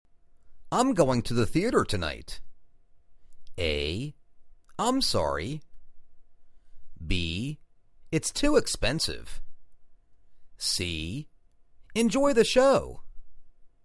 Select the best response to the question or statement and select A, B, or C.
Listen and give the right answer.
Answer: Enjoy the show.